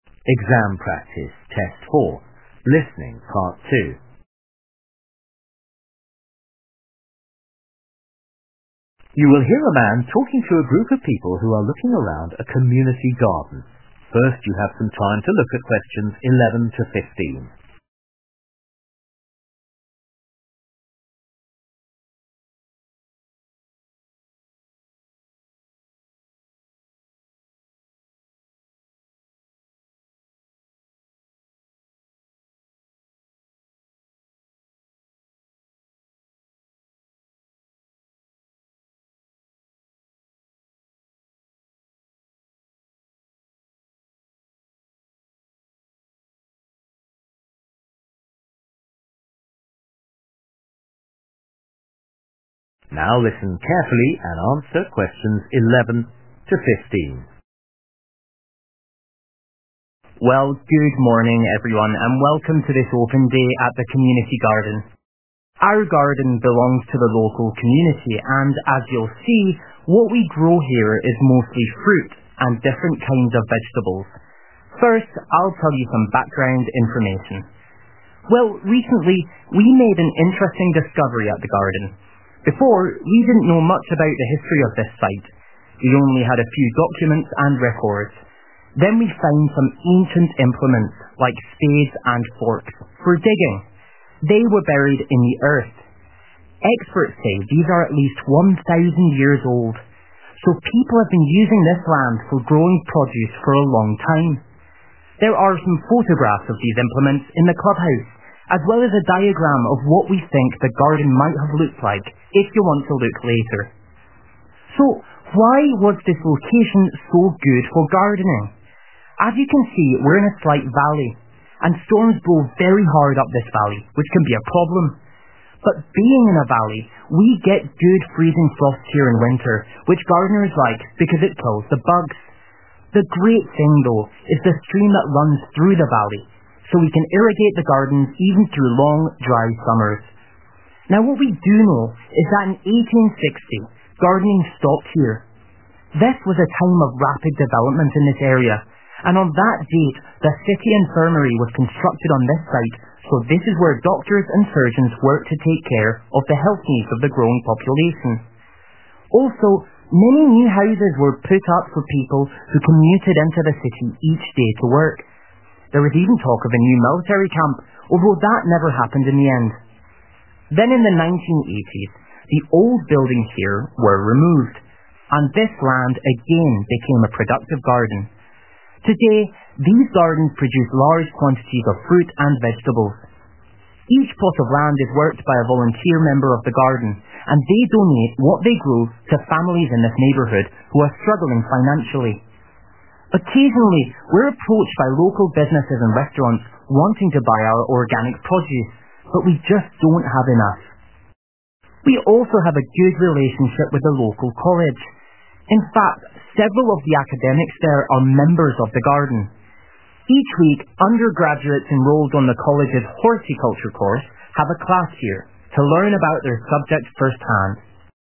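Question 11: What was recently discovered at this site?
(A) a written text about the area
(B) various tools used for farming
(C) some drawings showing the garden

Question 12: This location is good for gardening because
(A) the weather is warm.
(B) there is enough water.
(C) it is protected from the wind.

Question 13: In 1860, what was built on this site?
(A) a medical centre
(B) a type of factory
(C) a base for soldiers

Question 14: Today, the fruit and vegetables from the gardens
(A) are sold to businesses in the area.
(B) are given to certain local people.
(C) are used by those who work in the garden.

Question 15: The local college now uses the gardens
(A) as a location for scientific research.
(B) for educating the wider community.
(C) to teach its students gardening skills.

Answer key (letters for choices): 11B, 12B, 13A, 14B, 15C

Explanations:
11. Well, recently we made an interesting discovery at the garden. 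Before, we didn't know much about the history of this site. We only had a few documents and records. Then we found some ancient implements, like spades and forks, for digging. They were buried in the earth. Experts say these are at least 1000 years old. So people have been using this land for growing produce for a long time. (Sau đó, chúng tôi tìm thấy một số dụng cụ cổ xưa, như thuổng và đinh ba, để đào đất. Chúng đã bị chôn vùi trong đất. Các chuyên gia cho biết những thứ này có ít nhất 1000 năm tuổi. Vì vậy, người dân đã sử dụng vùng đất này để trồng trọt trong một thời gian dài)
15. We also have a good relationship with the local college. In fact, several of the academics there are members of the garden. Each week, undergraduates enrolled on the college's horticulture course have a class here, to learn about their subject first hand (Trên thực tế, một số học giả ở đó là thành viên của khu vườn. 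Mỗi tuần, sinh viên đã đăng ký khóa học làm vườn của trường đại học có một lớp học ở đây để tìm hiểu trực tiếp về môn học của họ). And in future the college hopes to hold workshops here, to help local people establish vegetable gardens at home.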